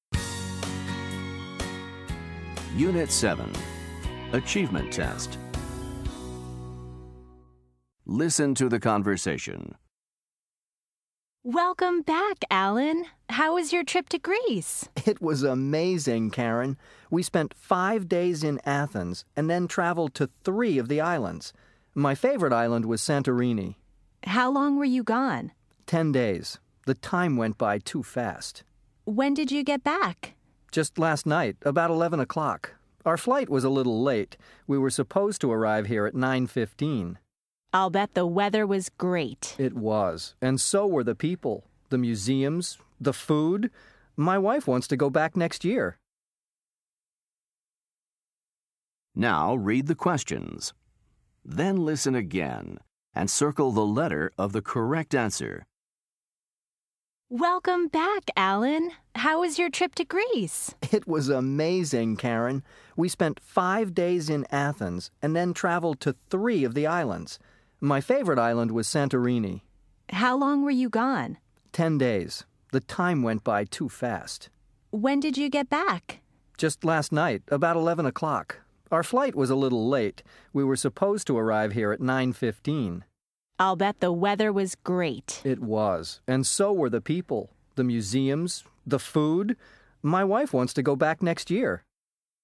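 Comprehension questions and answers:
Listen to the conversation. Then choose the correct answer for each question.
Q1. How was Alan's trip?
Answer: amazing

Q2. How long was Alan's trip?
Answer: 10 days

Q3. When did Alan get back?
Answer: last night, about 11 o'clock

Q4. Alan thinks that the food he ate on his vacation was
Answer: great

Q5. Alan's flight home was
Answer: a little late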